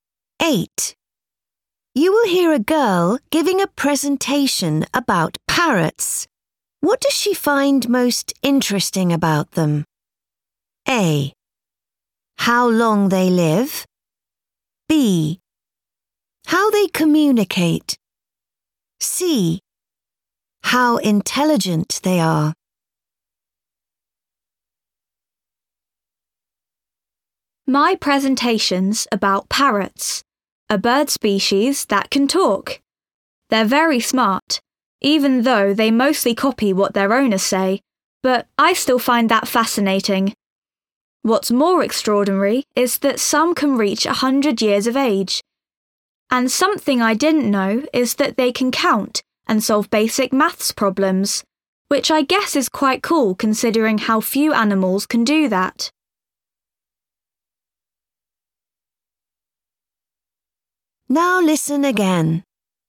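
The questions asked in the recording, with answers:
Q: What does she find most interesting about them?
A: A: How long they live.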